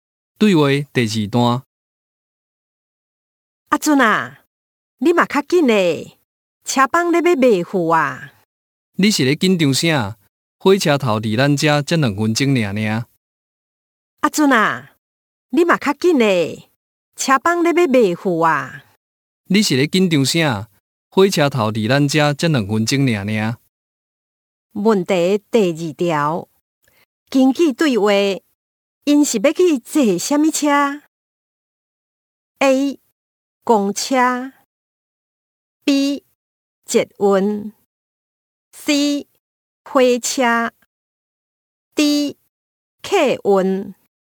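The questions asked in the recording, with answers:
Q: 根据对话。因是要去坐什么车?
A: C: 火车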